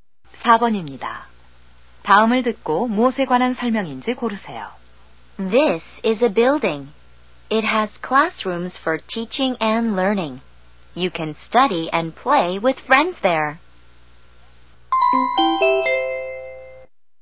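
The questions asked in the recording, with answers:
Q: 다음을 듣고 무엇에 관한 설명인지 고르세요.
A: 학교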